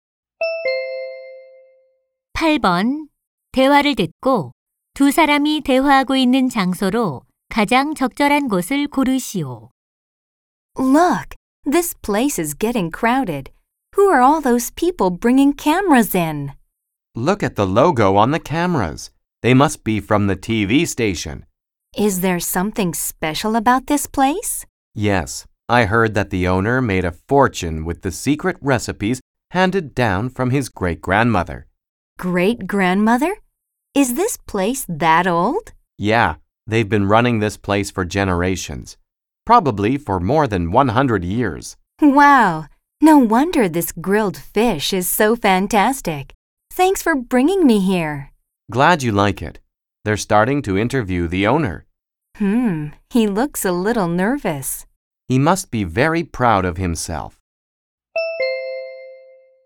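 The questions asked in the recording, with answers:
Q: 대화를 듣고 두 사람이 대화하고 있는 장소로 가장 적절한 곳을 고르시오.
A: 식당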